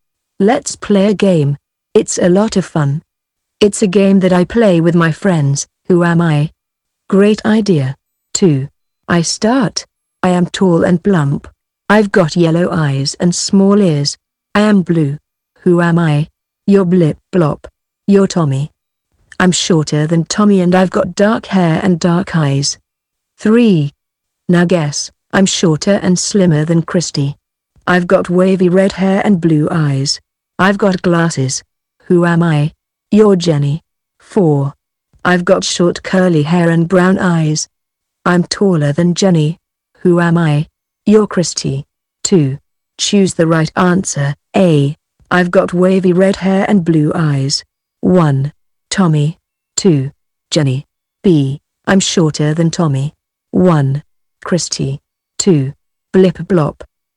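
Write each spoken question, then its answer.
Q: I've got wavy red hair and blue eyes.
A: 2: Jenny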